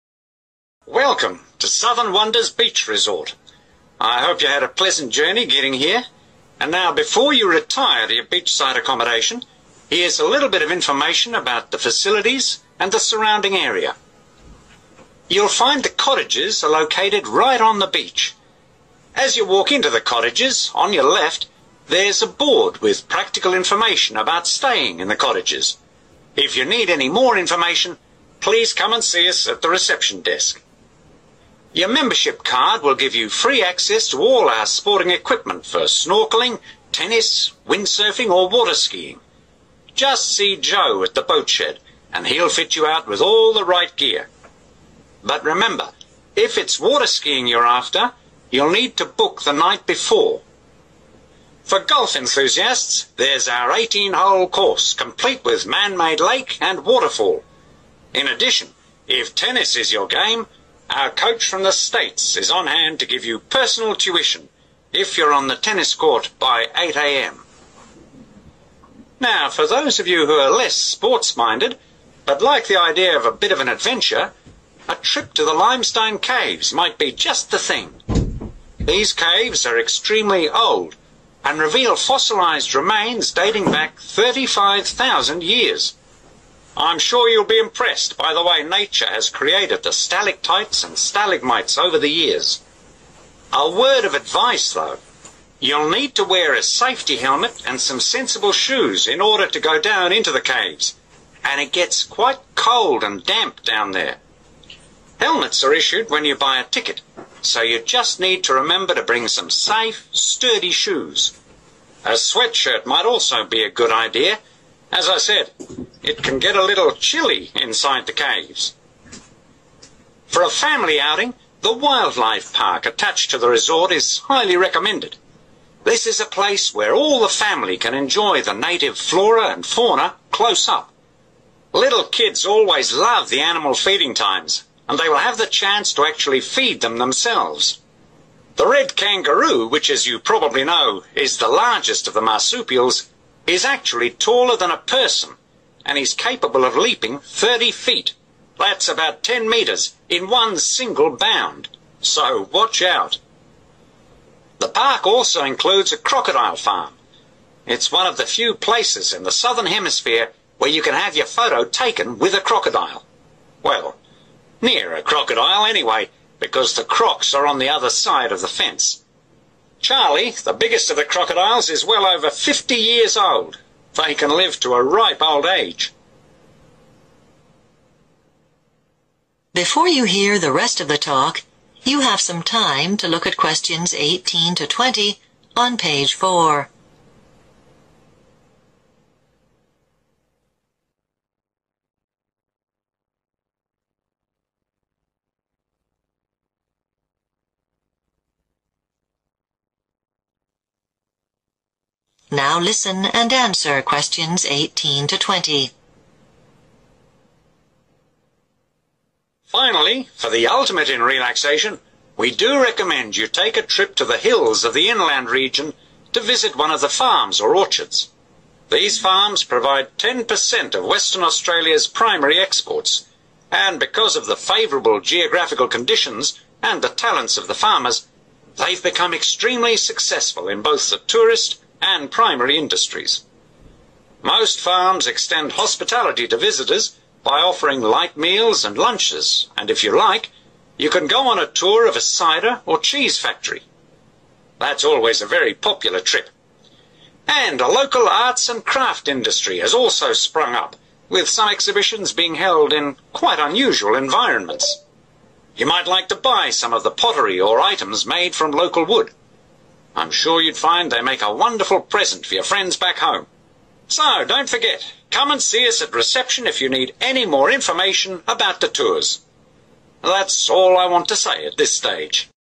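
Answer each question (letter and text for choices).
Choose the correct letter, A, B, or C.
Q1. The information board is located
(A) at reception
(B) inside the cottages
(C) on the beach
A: (B) inside the cottages

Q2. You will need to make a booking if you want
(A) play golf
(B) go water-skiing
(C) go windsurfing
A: (B) go water-skiing

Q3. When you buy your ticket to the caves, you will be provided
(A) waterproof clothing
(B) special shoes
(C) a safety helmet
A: (C) a safety helmet

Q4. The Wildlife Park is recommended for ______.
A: families

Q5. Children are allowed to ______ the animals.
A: feed

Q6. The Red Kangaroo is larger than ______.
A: a person

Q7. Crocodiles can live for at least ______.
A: 50 years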